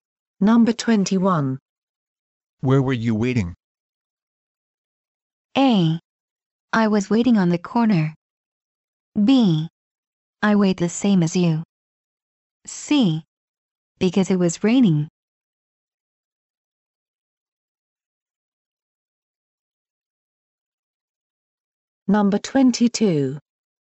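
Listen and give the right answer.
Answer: A: I was waiting on the corner.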